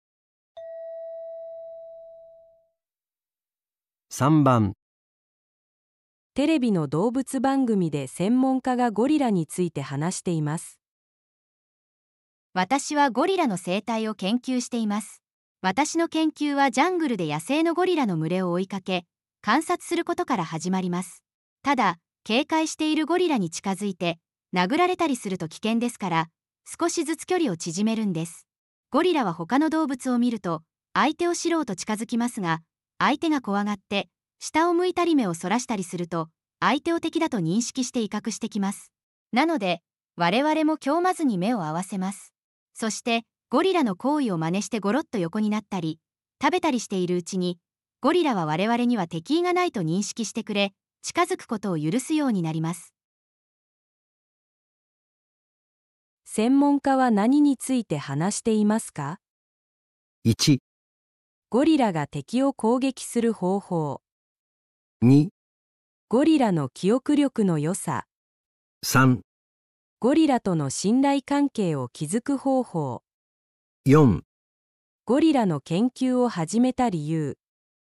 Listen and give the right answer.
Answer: 3

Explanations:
正确选项3:专家重点描述如何通过模仿行为、保持眼神接触建立信任。 选项1和2未涉及;选项4是研究背景,非核心内容。

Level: N1